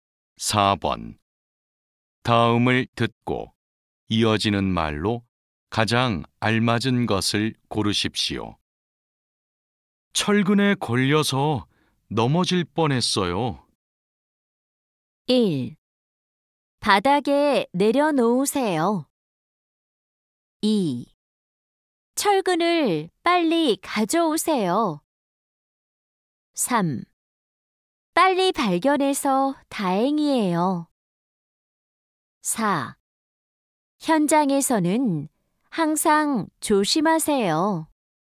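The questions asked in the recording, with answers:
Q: 철근에 걸려서 넘어질 뻔했어요.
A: 4: 현장에서는 항상 조심하세요.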